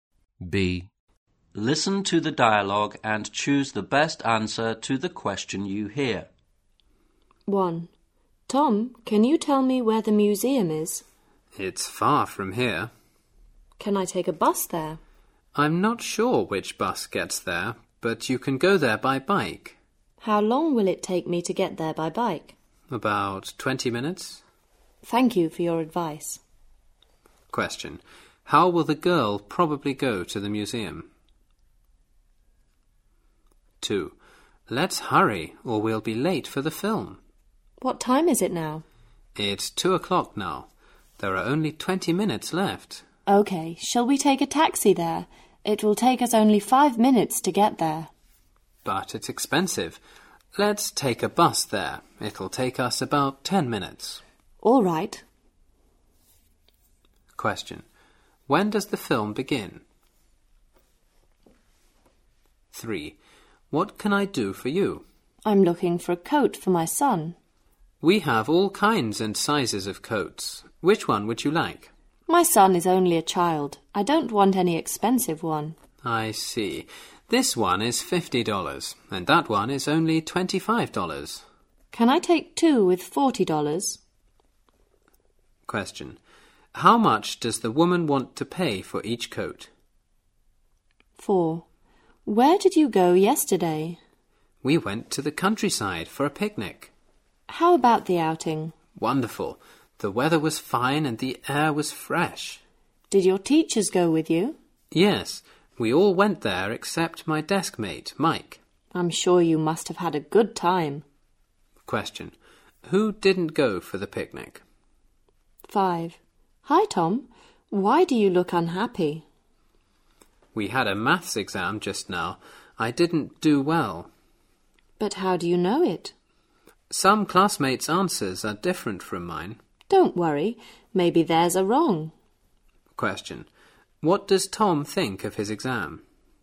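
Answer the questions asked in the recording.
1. By bike
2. At 2:20
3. $20
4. Mike
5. He thinks he didn't do well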